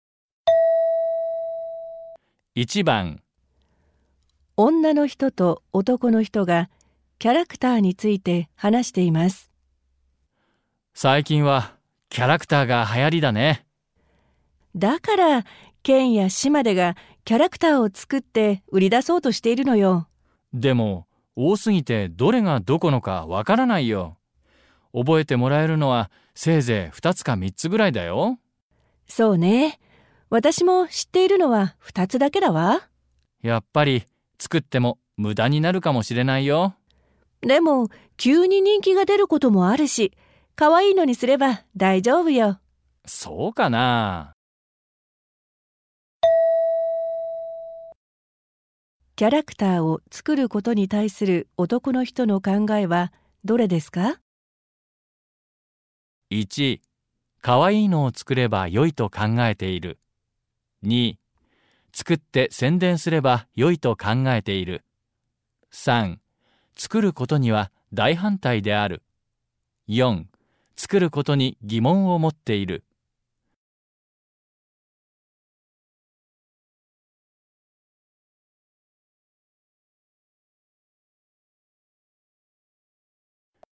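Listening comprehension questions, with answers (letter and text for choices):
問題3では、問題用紙に何もいんさつされていません。この問題は、全体としてどんな内容かを聞く問題です。話の前に質問はありません。まず話を聞いてください。それから、質問とせんたくしを聞いて、1から4の中から、最もよいものを一つ選んでください。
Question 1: キャラクターを作ることに対する男の人の考えはどれですか。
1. 可愛いのを作ればよいと考えている/Nghĩ là cứ làm các nhân vật dễ thương là được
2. 作って宣伝すればよいと考えている/ Nghĩ là nếu sáng tạo và quảng cáo cho các nhân vật là được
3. 作ることには大反対である/ Cực kỳ phản đối việc tạo ra các nhân vật biểu tượng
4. 作ることに疑問を持っている/ Nghi ngờ về việc tạo ra các nhân vật biểu tượng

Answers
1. 4. 作ることに疑問を持っている/ Nghi ngờ về việc tạo ra các nhân vật biểu tượng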